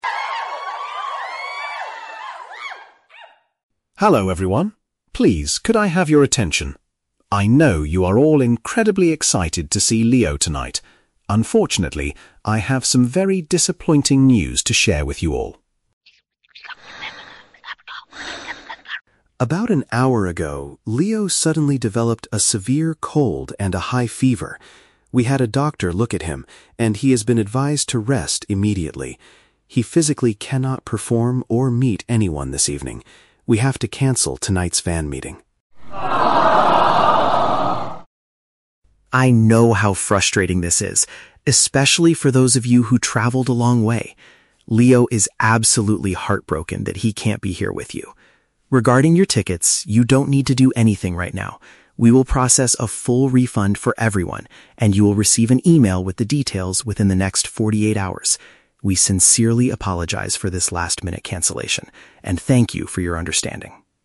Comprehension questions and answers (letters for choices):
Listen to a manager making an announcement to a crowd of fans. Choose the correct answer (A, B, or C) for each question.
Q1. What is the main purpose of the manager's announcement?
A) To introduce the singer to the stage for the first performance.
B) To inform the audience that the scheduled event will not take place.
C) To ask the fans to wait patiently for another hour.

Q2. What exactly is wrong with the singer?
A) He lost his voice after performing too much earlier this week.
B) He was injured in a minor traffic accident on his way to the venue.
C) He suddenly became very sick with a bad temperature.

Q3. How will the fans get their money back?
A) They will be sent an electronic message with the payment information.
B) They must visit the main ticket office outside the building immediately.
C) They will automatically receive a replacement ticket for a future date.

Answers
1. B
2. C
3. A

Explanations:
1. The manager says, "We have to cancel tonight's fan meeting," which means the scheduled event will not take place.
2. The manager explains that Leo developed a "severe cold and a high fever" (which paraphrases to becoming very sick with a bad temperature).
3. The manager states that they will process a full refund and fans will "receive an email with the details" (which paraphrases to being sent an electronic message with the payment information).

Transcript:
Manager: "Hello everyone. Please, could I have your attention? I know you are all incredibly excited to see Leo tonight. Unfortunately, I have some very disappointing news to share with you all."
Manager: "About an hour ago, Leo suddenly developed a severe cold and a high fever. We had a doctor look at him, and he has been advised to rest immediately. He physically cannot perform or meet anyone this evening. We have to cancel tonight's fan meeting."
Manager: "I know how frustrating this is, especially for those of you who traveled a long way. Leo is absolutely heartbroken that he can't be here with you. Regarding your tickets, you don't need to do anything right now. We will process a full refund for everyone, and you will receive an email with the details within the next forty-eight hours. We sincerely apologize for this last-minute cancellation and thank you for your understanding."